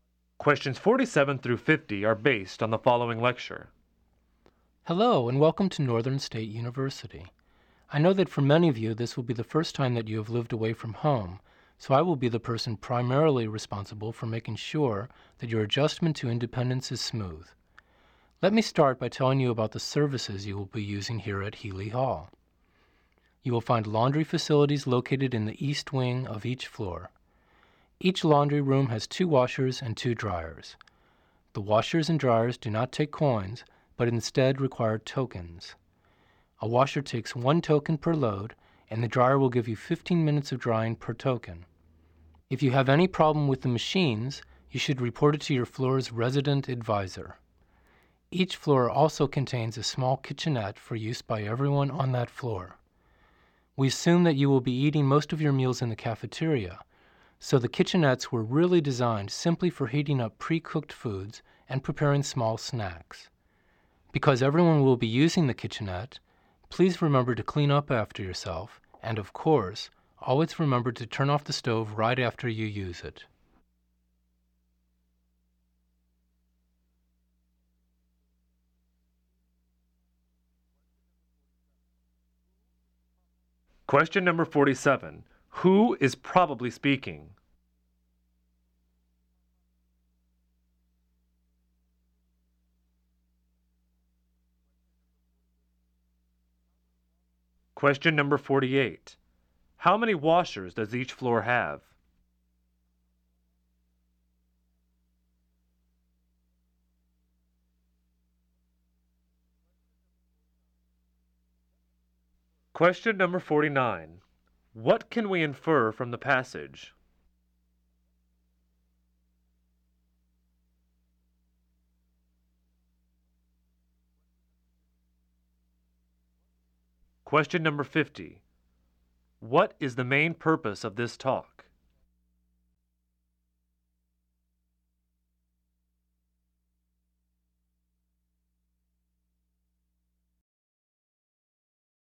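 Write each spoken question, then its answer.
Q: How many washers does each floor have?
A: Two

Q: What is the main purpose of this talk?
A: To tell new students about the services in their residence hall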